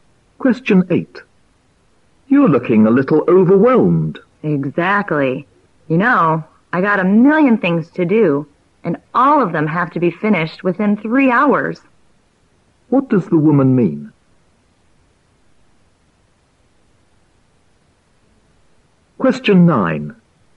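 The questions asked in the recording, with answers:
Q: What does the woman mean?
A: She has too many things to do in very little time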